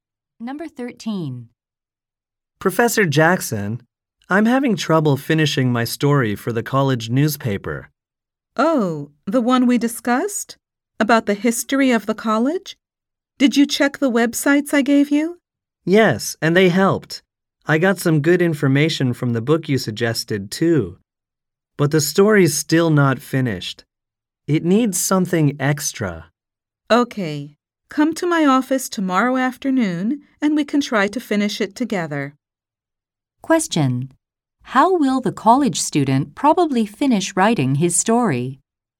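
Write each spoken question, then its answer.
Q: How will the college student probably finish writing his story?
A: With the professor's help in his office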